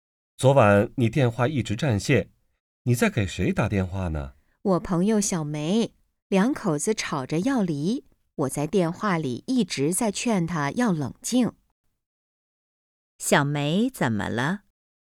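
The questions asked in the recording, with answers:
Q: 小梅怎么了?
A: 和丈夫吵架,要离婚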